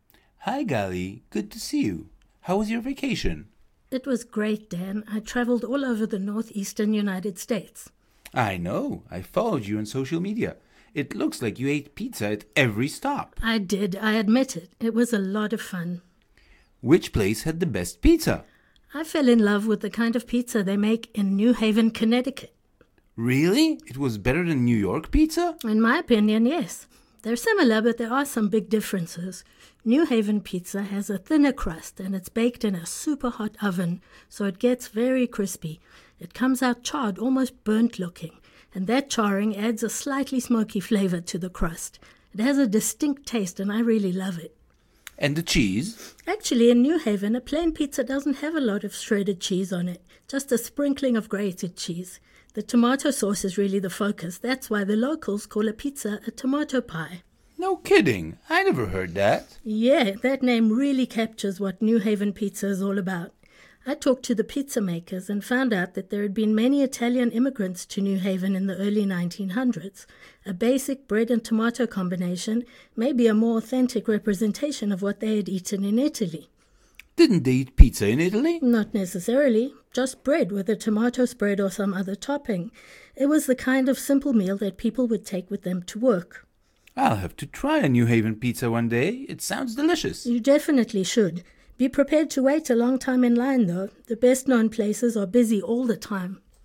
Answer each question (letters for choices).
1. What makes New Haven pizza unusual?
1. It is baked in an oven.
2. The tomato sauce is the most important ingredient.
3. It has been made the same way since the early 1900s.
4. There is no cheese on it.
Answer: 2

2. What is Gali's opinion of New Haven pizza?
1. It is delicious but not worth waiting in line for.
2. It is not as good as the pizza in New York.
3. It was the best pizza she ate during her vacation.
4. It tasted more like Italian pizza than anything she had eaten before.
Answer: 3